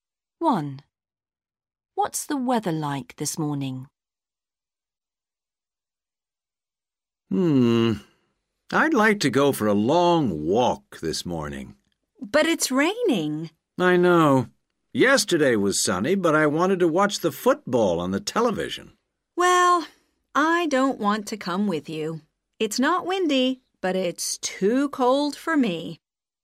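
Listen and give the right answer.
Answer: rainy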